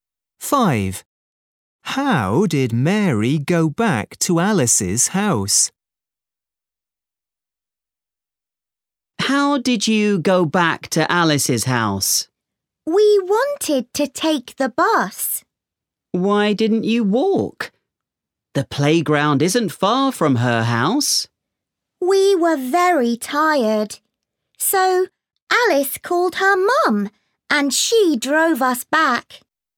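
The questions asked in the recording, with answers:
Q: How did Mary go back to Alice's house?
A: by car (Alice's mum drove them)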